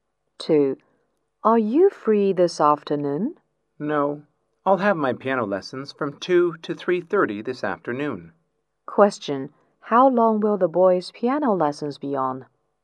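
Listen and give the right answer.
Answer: One and a half hours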